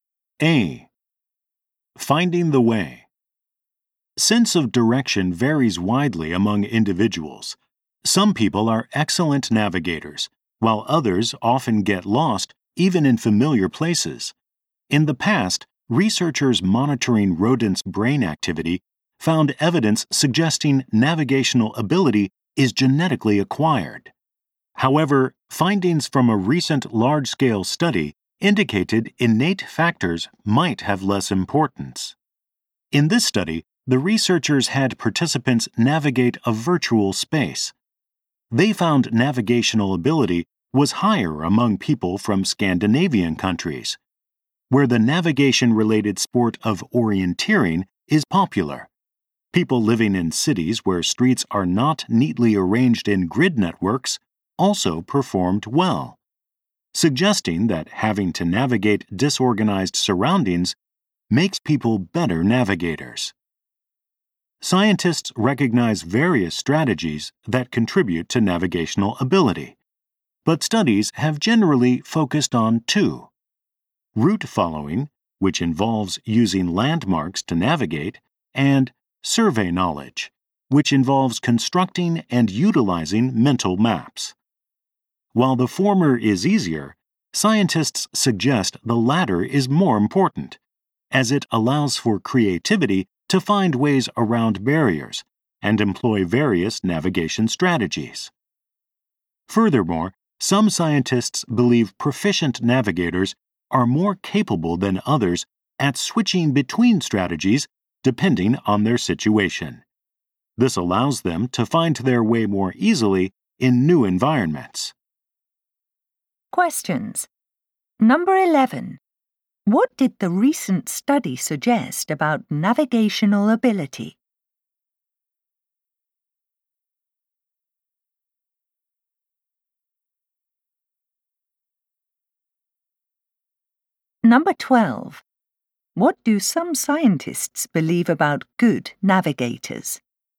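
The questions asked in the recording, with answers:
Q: What did the recent study suggest about navigational ability?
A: It is influenced more by environment and experience than by innate factors

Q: What do some scientists believe about good navigators?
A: They are better at switching between strategies depending on the situation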